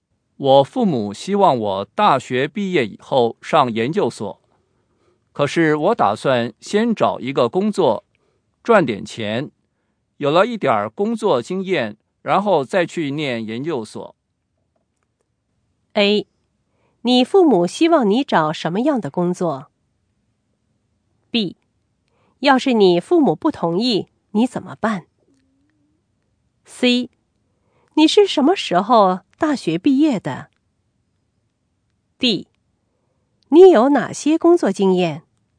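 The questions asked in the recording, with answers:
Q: 我父母希望我大学毕业以后上研究所,可是我打算先找一个工作,赚点钱,有了一点工作经验,然后再去念研究所。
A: B: 要是你父母不同意,你怎么办?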